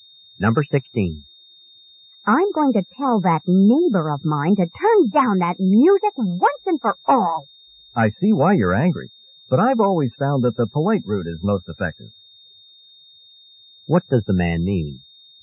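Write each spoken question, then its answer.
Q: What does the man mean?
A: She should ask the neighbor politely.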